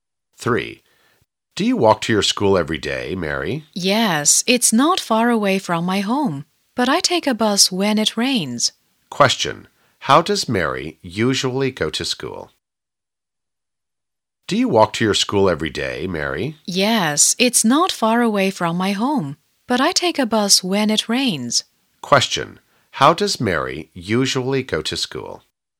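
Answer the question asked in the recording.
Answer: On foot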